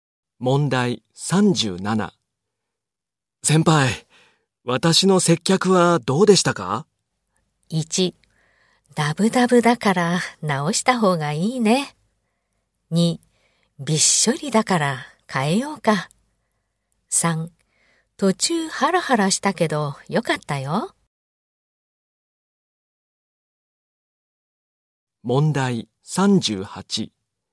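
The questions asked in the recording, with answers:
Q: 先輩、私の接客はどうでしたか?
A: 3: 途中ハラハラしたけどよかったよ。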